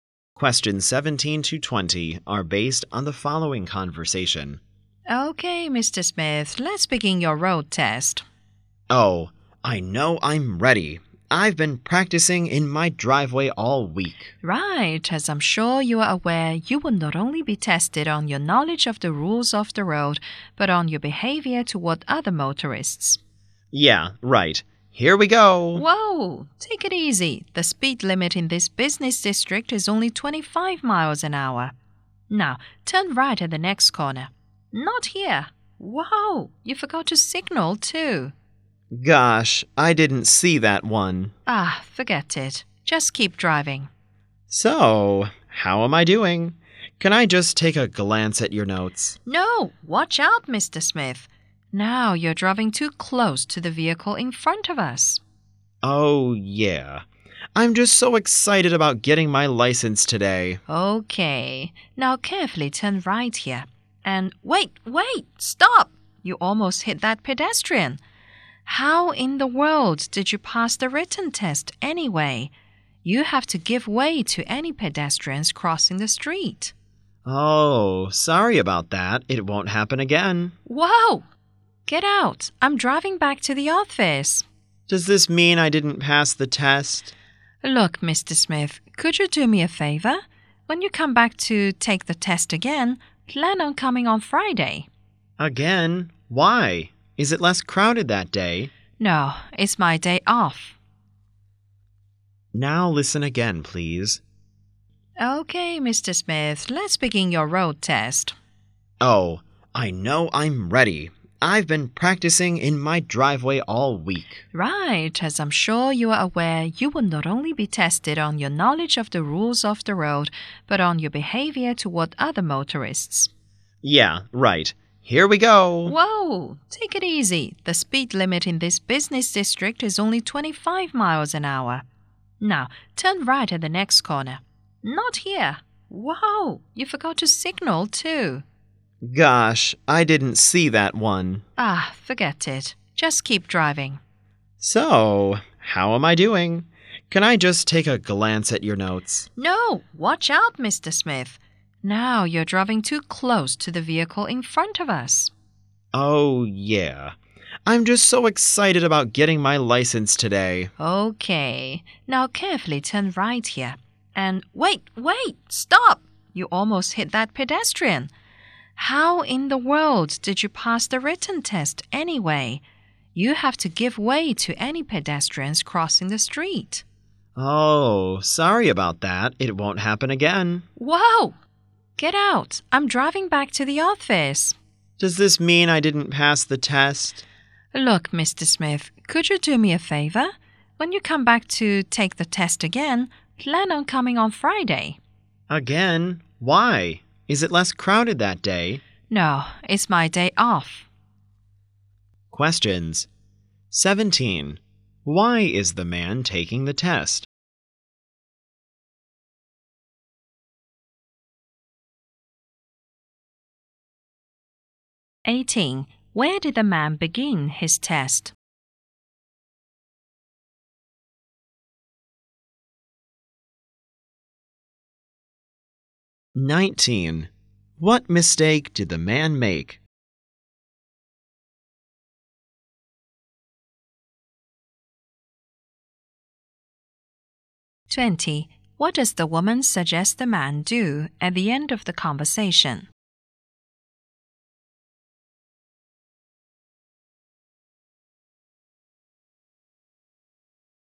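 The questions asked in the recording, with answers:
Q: Why is the man taking the test?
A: To get his driver's license

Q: What does the woman suggest the man do at the end of the conversation?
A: Come back on Friday to take the test again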